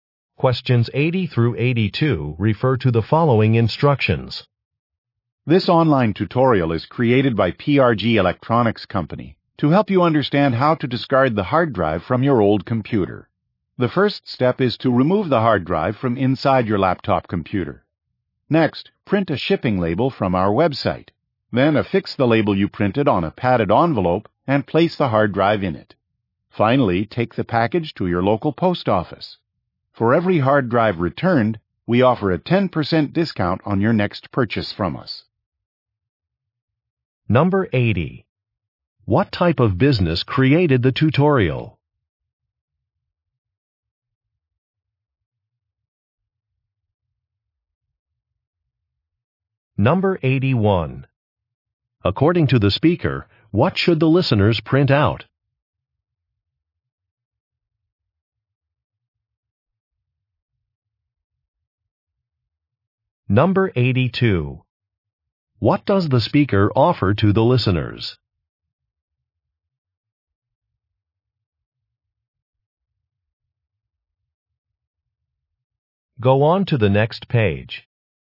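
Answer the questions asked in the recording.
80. An electronics company
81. A shipping label
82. A 10% discount on their next purchase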